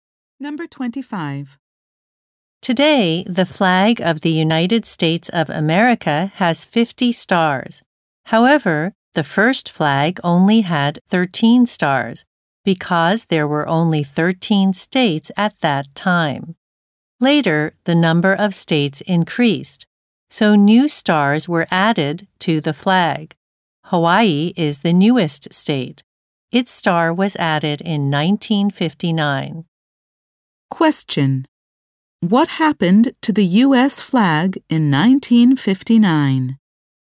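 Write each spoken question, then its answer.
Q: What happened to the U.S.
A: Hawaii's star was added to it.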